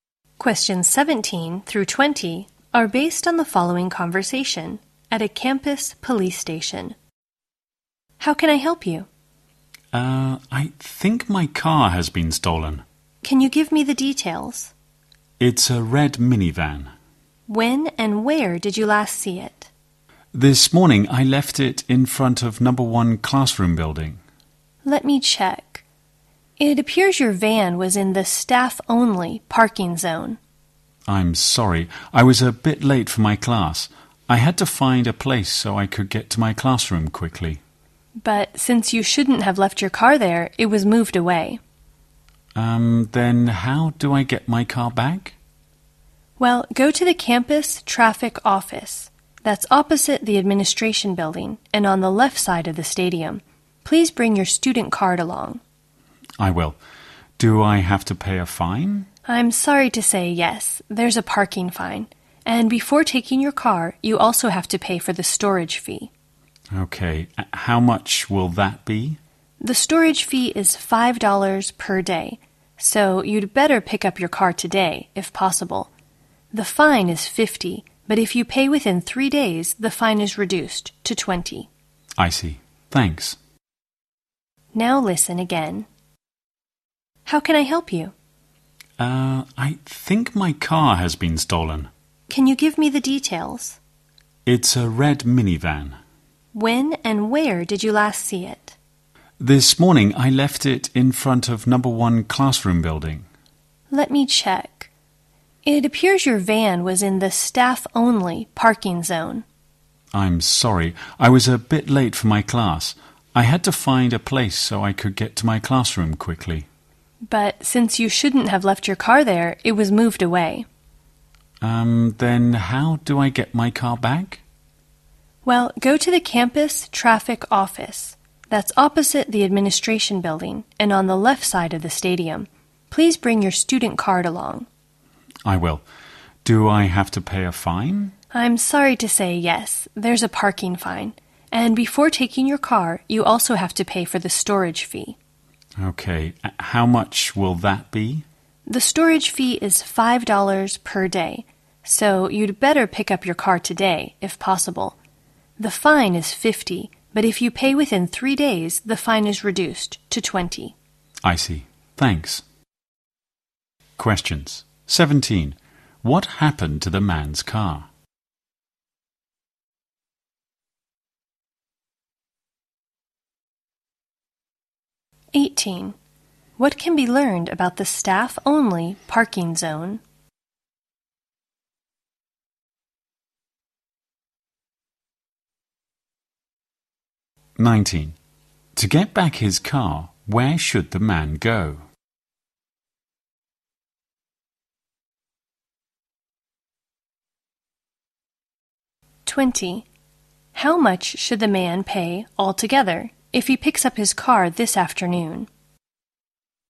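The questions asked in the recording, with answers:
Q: What happened to the man's car?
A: It was moved away for being parked in the staff-only zone

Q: To get back his car, where should the man go?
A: The campus traffic office

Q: How much should the man pay altogether if he picks up his car this afternoon?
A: $25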